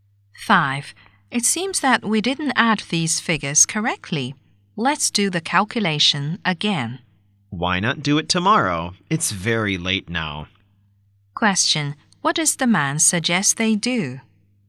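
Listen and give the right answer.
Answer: Do the calculation again tomorrow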